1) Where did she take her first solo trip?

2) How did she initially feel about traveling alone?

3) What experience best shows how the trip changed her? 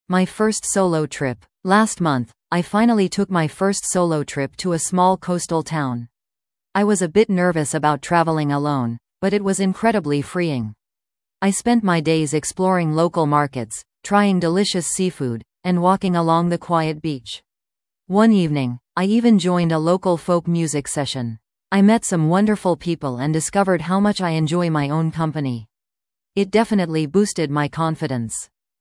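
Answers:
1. To a small coastal town
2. A bit nervous
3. She discovered she enjoys her own company, which boosted her confidence

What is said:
My First Solo Trip
Last month, I finally took my first solo trip to a small coastal town. I was a bit nervous about traveling alone, but it was incredibly freeing. I spent my days exploring local markets, trying delicious seafood, and walking along the quiet beach. One evening, I even joined a local folk music session. I met some wonderful people and discovered how much I enjoy my own company. It definitely boosted my confidence.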